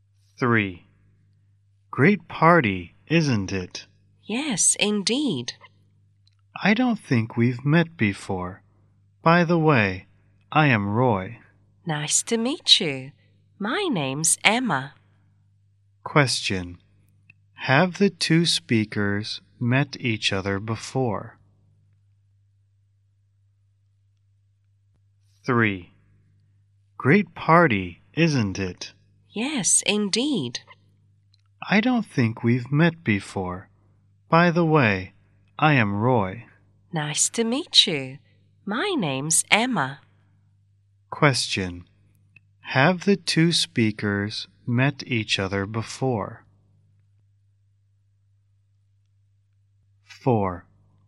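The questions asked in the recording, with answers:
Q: Have the two speakers met each other before?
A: No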